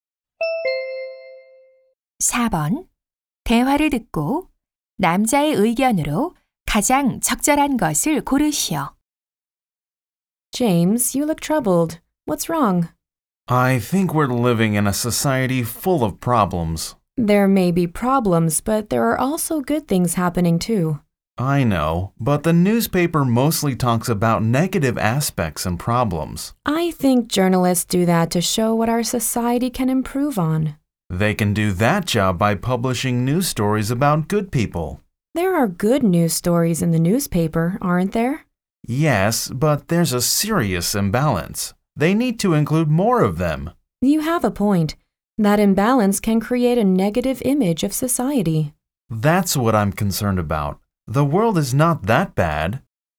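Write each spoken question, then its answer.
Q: 대화를 듣고 남자의 의견으로 가장 적절한 것을 고르시오.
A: 신문은 좋은 소식을 더 많이 실어야 한다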